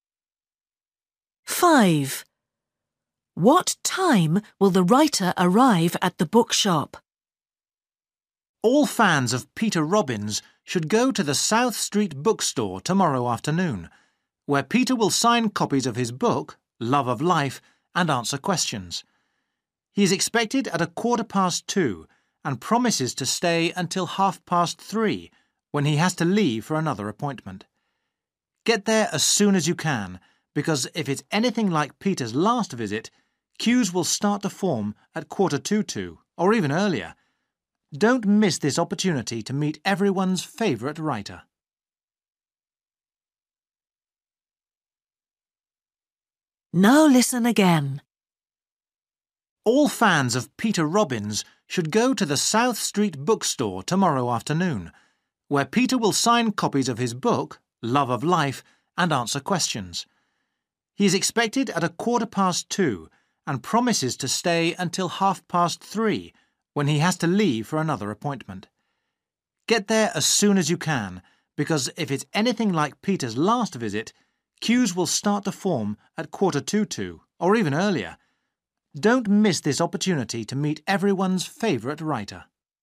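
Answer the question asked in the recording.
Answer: 2:15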